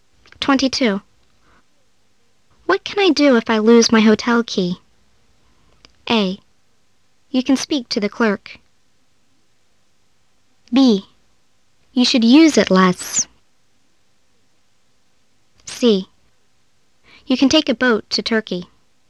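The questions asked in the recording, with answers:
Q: What can I do if I lose my hotel key?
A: A: You can speak to the clerk.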